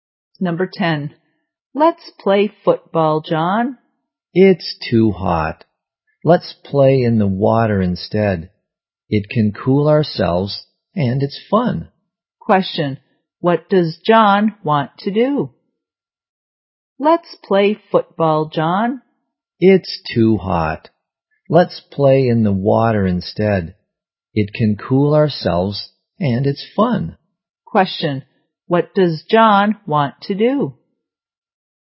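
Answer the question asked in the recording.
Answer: Play in the water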